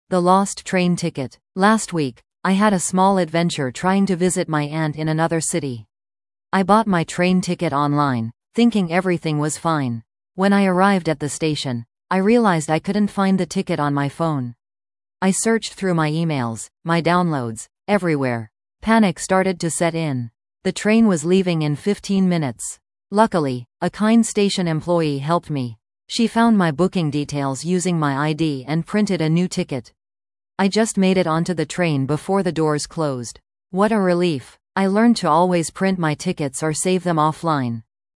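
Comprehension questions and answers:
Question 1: Why was the speaker going to another city?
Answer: To visit her aunt.

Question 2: What problem did the speaker encounter at the train station?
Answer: She couldn't find her ticket on her phone.

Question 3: Who helped the speaker with her problem?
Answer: A kind station employee.

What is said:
The Lost Train Ticket
Last week, I had a small adventure trying to visit my aunt in another city. I bought my train ticket online, thinking everything was fine. When I arrived at the station, I realized I couldn't find the ticket on my phone! I searched through my emails, my downloads, everywhere. Panic started to set in. The train was leaving in 15 minutes! Luckily, a kind station employee helped me. She found my booking details using my ID and printed a new ticket. I just made it onto the train before the doors closed. What a relief! I learned to always print my tickets or save them offline.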